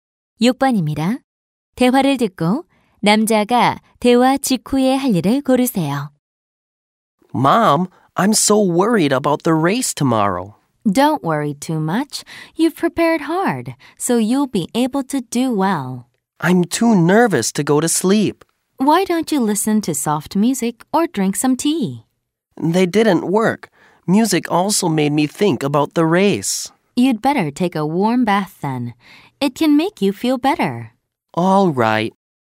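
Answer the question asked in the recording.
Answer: 따뜻한 목욕하기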